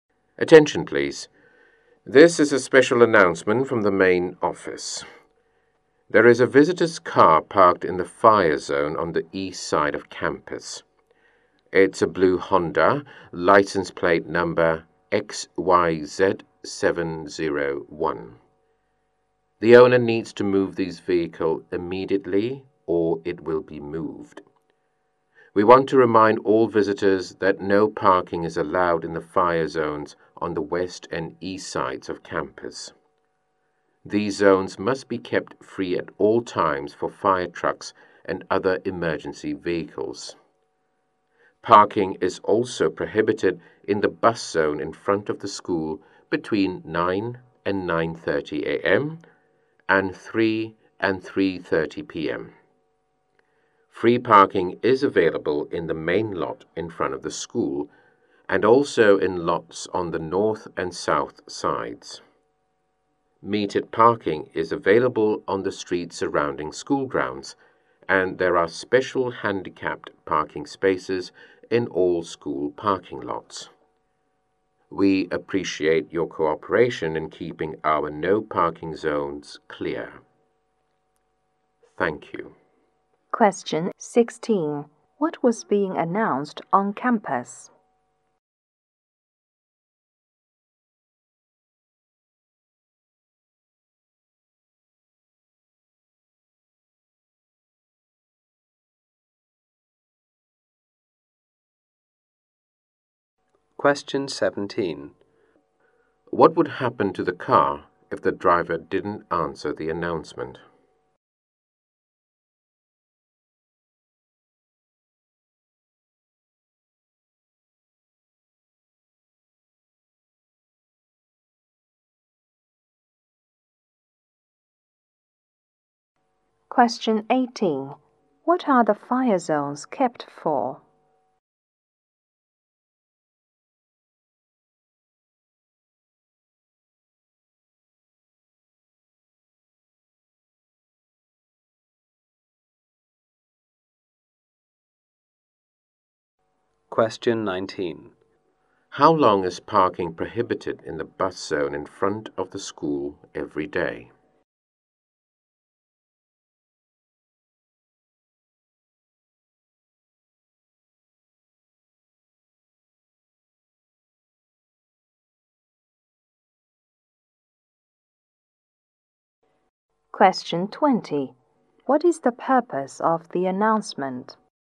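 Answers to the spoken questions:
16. A visitor's car parked in the fire zone
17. It would be moved
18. Fire trucks and emergency vehicles
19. One hour
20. To keep no-parking zones clear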